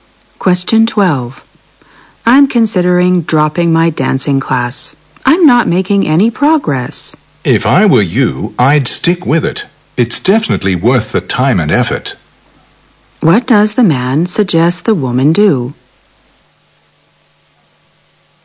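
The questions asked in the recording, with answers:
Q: What does the man suggest the woman do?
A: Continue the dancing class.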